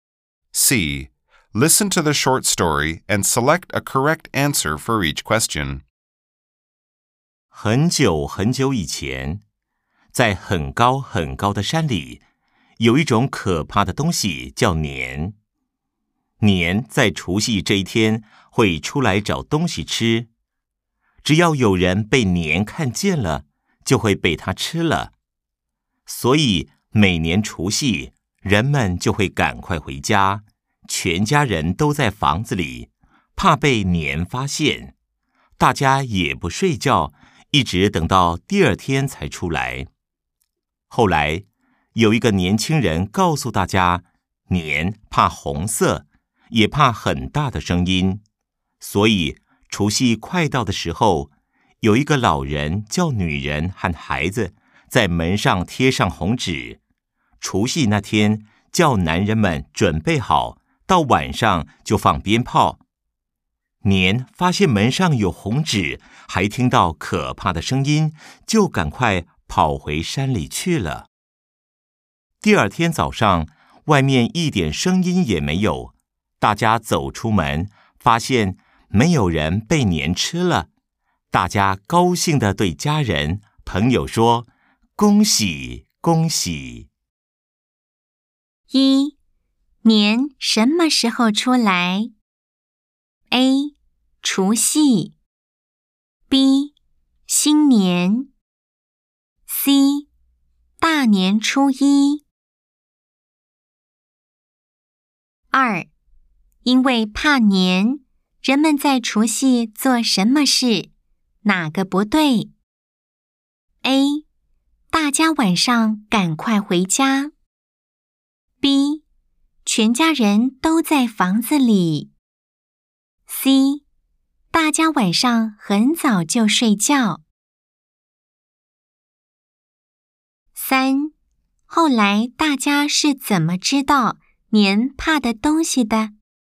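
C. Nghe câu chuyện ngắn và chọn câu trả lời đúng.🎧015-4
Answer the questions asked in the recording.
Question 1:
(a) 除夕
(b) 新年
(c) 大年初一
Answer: (a) 除夕
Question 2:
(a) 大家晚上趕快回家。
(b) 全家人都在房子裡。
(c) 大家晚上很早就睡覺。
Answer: (c) 大家晚上很早就睡覺。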